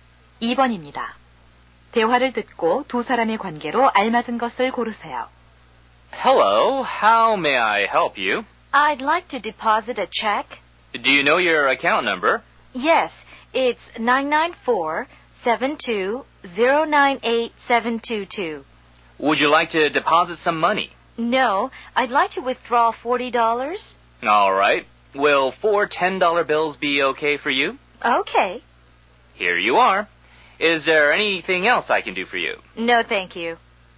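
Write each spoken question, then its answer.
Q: 대화를 듣고 두 사람의 관계로 알맞은 것을 고르세요.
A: 은행 직원과 고객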